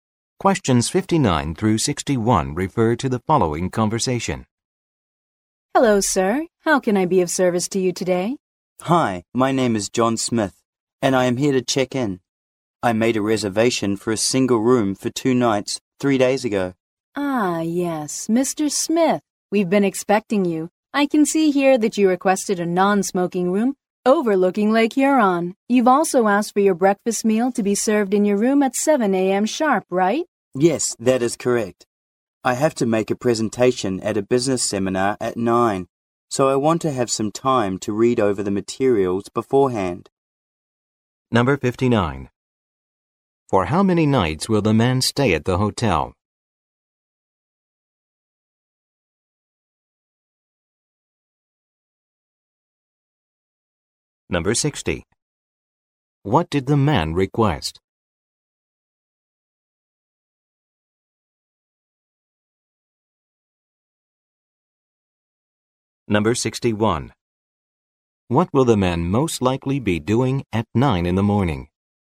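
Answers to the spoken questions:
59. Two
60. A non-smoking room overlooking the lake with breakfast in the room at 7
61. Making a presentation at a business seminar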